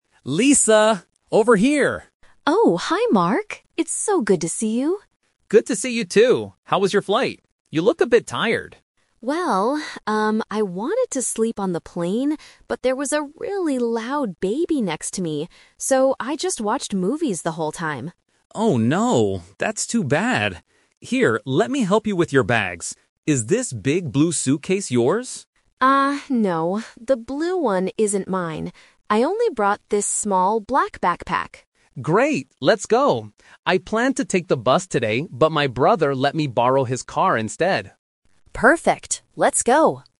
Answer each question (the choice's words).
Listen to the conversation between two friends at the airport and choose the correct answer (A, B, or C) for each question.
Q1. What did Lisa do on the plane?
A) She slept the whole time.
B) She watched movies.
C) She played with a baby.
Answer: She watched movies.

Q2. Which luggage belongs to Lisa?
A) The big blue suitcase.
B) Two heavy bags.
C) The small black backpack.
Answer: The small black backpack.

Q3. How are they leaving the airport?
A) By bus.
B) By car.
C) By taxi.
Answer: By car.

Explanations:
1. Lisa says, "I wanted to sleep... but there was a really loud baby... So, I just watched movies." Option (A) is the trap because sleeping was her original plan, but she couldn't do it. Option (C) uses a word from the audio ("baby") to confuse the listener, but it is incorrect.
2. Mark asks if the "big blue suitcase" is hers, but Lisa says no. She says she only brought a "small black backpack." Option (A) is the trap because it is mentioned but immediately rejected. Option (B) is not mentioned at all.
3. Mark says, "I planned to take the bus today, but my brother let me borrow his car instead." Option (A) is the trap because the bus was the original plan that got canceled. Option (C) is a common airport transport but is not mentioned in the audio.

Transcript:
Mark: Lisa! Over here!
Lisa: Oh, hi Mark! It's so good to see you.
Mark: Good to see you too! How was your flight? You look a bit tired.
Lisa: Well, um, I wanted to sleep on the plane, but there was a really loud baby next to me. So, I just watched movies the whole time.
Mark: Oh no, that's too bad. Here, let me help you with your bags. Is this big blue suitcase yours?
Lisa: Ah, no, the blue one isn't mine. I only brought this small black backpack.
Mark: Great! Let's go. I planned to take the bus today, but my brother let me borrow his car instead.
Lisa: Perfect! Let's go.